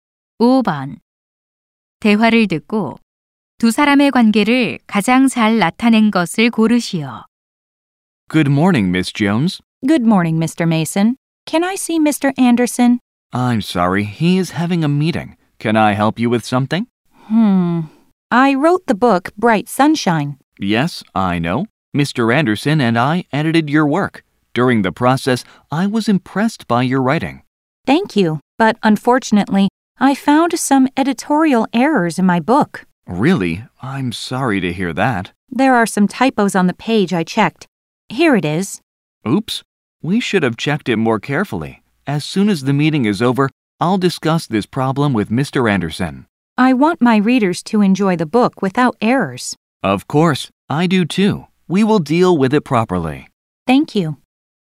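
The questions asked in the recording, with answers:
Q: 대화를 듣고 두 사람의 관계를 가장 잘 나타낸 것을 고르시오.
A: 작가 - 편집자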